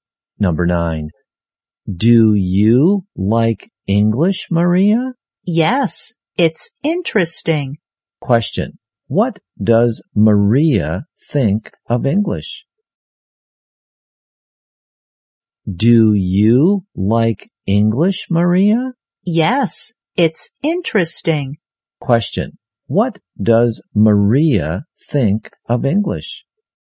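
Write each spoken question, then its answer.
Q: Question. What does Maria think of English?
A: Interesting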